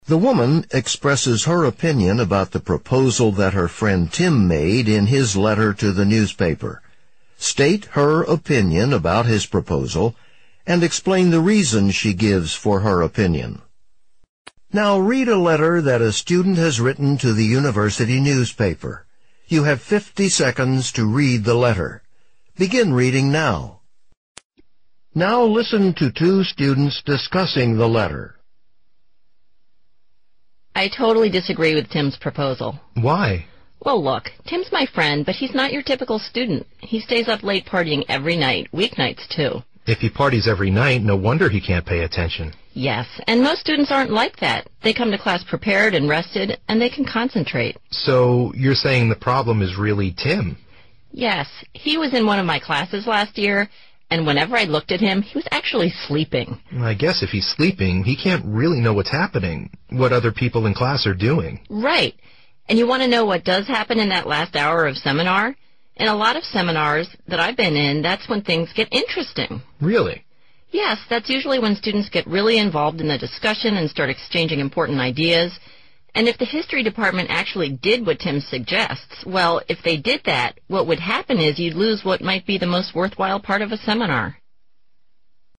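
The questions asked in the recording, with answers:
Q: State her opinion about his proposal and explain the reason she gives for her opinion.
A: She disagrees with Tim's proposal. Tim isn't a typical student: he parties every night and sleeps in class, while most students come rested and can concentrate. Also, the last hour of a seminar is often the most worthwhile part, when students get involved and exchange important ideas.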